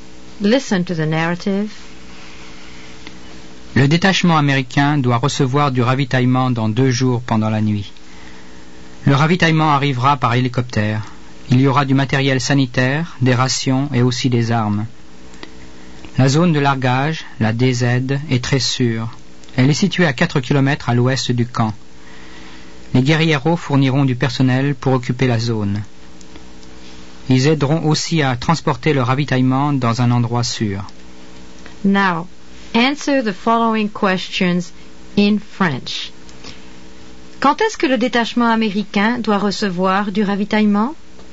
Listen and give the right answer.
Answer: Il doit recevoir un largage dans 2 jours, pendant la nuit.